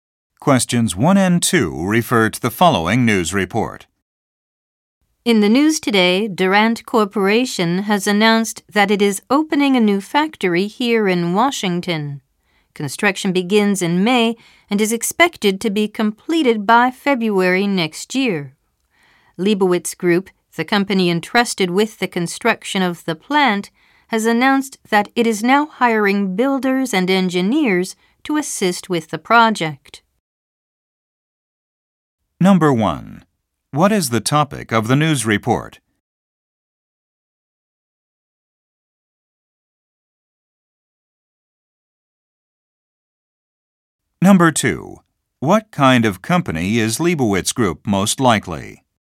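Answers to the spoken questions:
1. Durant Corporation opening a new factory in Washington
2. A construction company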